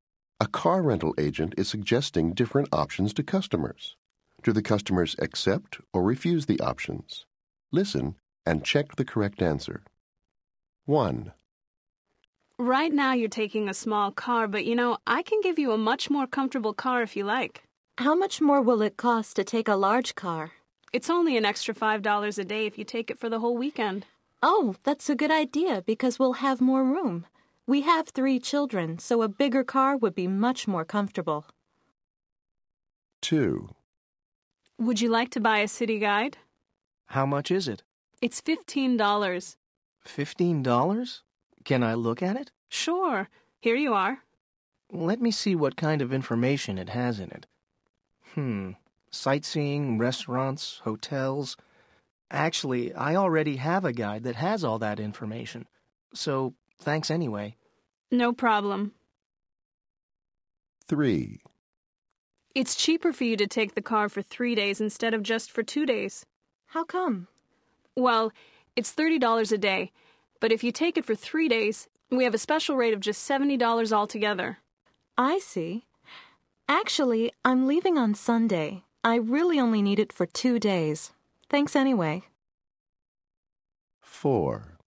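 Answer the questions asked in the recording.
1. Accept
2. Refuse
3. Refuse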